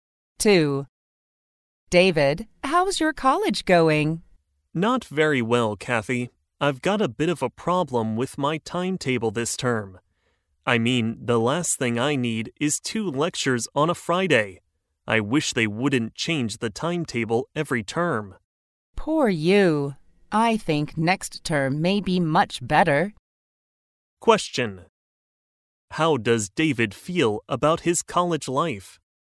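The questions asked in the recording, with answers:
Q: How does David feel about his college life?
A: Not happy, because of a problem with his timetable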